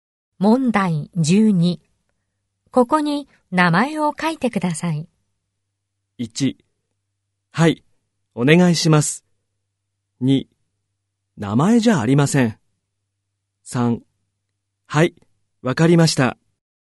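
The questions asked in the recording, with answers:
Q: ここに名前を書いてください。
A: 3: はい、わかりました。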